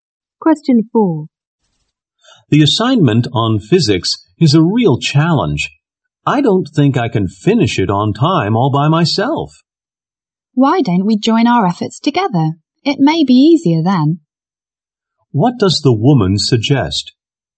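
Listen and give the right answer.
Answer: Doing the physics assignment together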